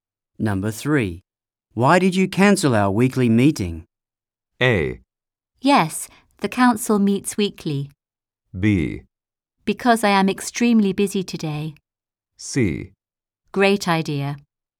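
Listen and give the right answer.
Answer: B: Because I am extremely busy today.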